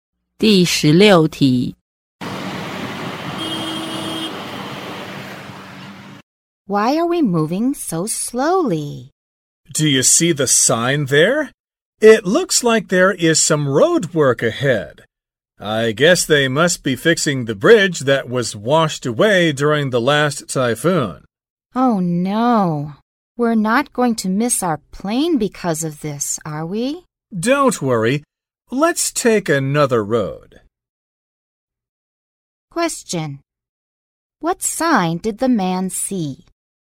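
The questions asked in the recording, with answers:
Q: What sign did the man see?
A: A road work sign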